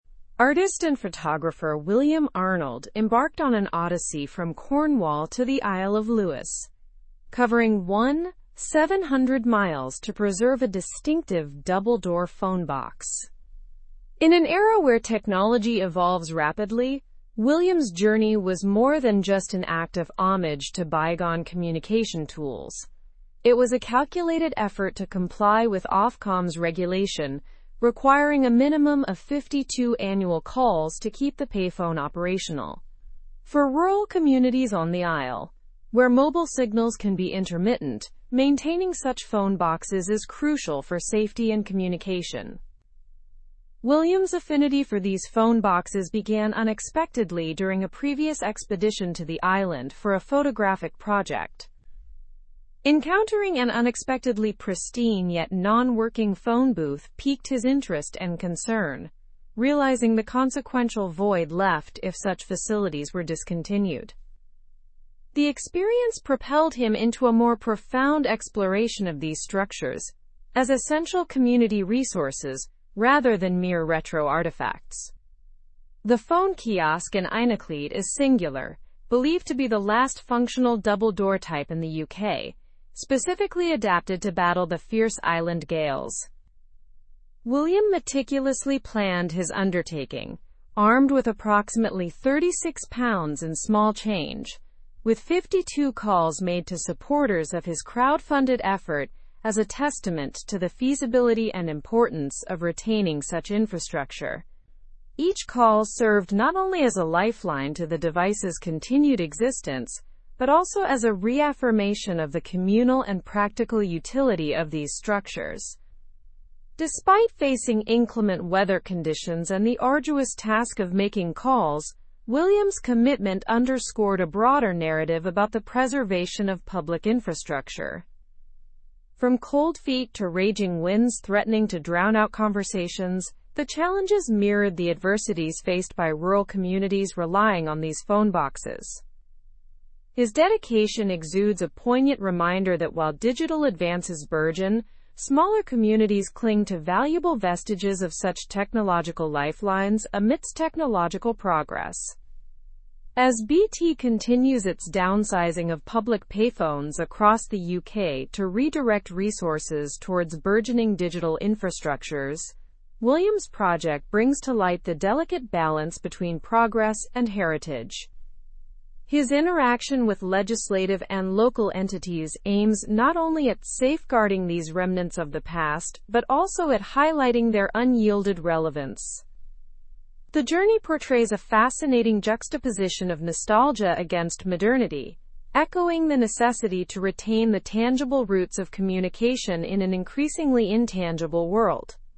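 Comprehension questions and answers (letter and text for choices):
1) What was the primary reason for William Arnold's journey?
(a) To take photographs of the island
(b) To visit friends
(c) To explore new places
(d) To preserve a distinctive phone box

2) How many calls did Ofcom require to keep the phone box operational?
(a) 100 annual calls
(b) 10 weekly calls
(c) 500 annual calls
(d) 52 annual calls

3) Where is the last functional double-door phone box in the UK located?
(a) London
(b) Cornwall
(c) Einacleit on the Isle of Lewis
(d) Edinburgh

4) What did William use to make the necessary calls?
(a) A mobile phone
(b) A credit card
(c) Approximately £36 in small change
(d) A landline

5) What challenges did William face during his endeavor?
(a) Inclement weather and arduous task of making calls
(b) Lack of sufficient funds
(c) Hostility from locals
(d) Mechanical issues with the phone box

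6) How does William's project relate to modern technology?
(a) It promotes digital transformation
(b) It highlights the need for technological balance and heritage preservation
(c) It discusses the drawbacks of digital devices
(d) It encourages the development of new digital infrastructures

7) What does BT plan to do with public payphones?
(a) Downsize them across the UK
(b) Increase their numbers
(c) Make them free of charge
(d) Integrate them with Wi-Fi hotspots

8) What broader issue does William's commitment highlight?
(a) Increase in population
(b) Preservation of public infrastructure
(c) Decline of tourism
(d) Diversification of local economies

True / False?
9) William enjoyed pleasant weather and relaxing tasks.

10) The kiosk is unique in battling island gales.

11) The phone box is crucial for rural community safety.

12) BT is downsizing public payphones across the UK.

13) Ofcom requires a minimum of 52 annual calls for operation.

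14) William last ignored these phone boxes during a photographic project.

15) The journey aimed to destroy a single-door phone box.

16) William Arnold traveled from Cornwall to the Isle of Skye.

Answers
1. (d) To preserve a distinctive phone box
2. (d) 52 annual calls
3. (c) Einacleit on the Isle of Lewis
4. (c) Approximately £36 in small change
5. (a) Inclement weather and arduous task of making calls
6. (b) It highlights the need for technological balance and heritage preservation
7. (a) Downsize them across the UK
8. (b) Preservation of public infrastructure
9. False
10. True
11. True
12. True
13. True
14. False
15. False
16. False

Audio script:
Artist and photographer William Arnold embarked on an odyssey from Cornwall to the Isle of Lewis, covering 1,700 miles to preserve a distinctive double-door phone box. In an era where technology evolves rapidly, William's journey was more than just an act of homage to bygone communication tools; it was a calculated effort to comply with Ofcom's regulation requiring a minimum of 52 annual calls to keep the payphone operational. 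For rural communities on the Isle, where mobile signals can be intermittent, maintaining such phone boxes is crucial for safety and communication.
William's affinity for these phone boxes began unexpectedly during a previous expedition to the island for a photographic project. Encountering an unexpectedly pristine yet non-working phone booth piqued his interest and concern, realizing the consequential void left if such facilities were discontinued. The experience propelled him into a more profound exploration of these structures as essential community resources rather than mere retro artifacts.
The phone kiosk in Einacleit is singular, believed to be the last functional double-door type in the UK, specifically adapted to battle the fierce island gales. William meticulously planned his undertaking, armed with approximately £36 in small change, with 52 calls made to supporters of his crowdfunded effort as a testament to the feasibility and importance of retaining such infrastructure. 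Each call served not only as a lifeline to the device's continued existence but also as a reaffirmation of the communal and practical utility of these structures.
Despite facing inclement weather conditions and the arduous task of making calls, William's commitment underscored a broader narrative about the preservation of public infrastructure.
weather conditions and the arduous task of making calls, William's commitment underscored a broader narrative about the preservation of public infrastructure. From cold feet to raging winds threatening to drown out conversations, the ? mirrored the adversities faced by rural communities relying on these phone boxes. His dedication exudes a poignant reminder that while digital advances burgeon, smaller communities cling to valuable vestiges of such technological lifelines ? technological progress. As BT continues its downsizing of public payphones across the UK to redirect resources towards burgeoning digital infrastructures, William's project brings to ? 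the ? balance between progress and ?. His interaction with legislative and local entities aims not only at safeguarding these remnants of the past but also at highlighting their unyielded relevance. The journey portrays a fascinating juxtaposition of nostalgia against modernity, echoing the necessity to retain the tangible roots of communication in an increasingly intangible world.

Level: Level 4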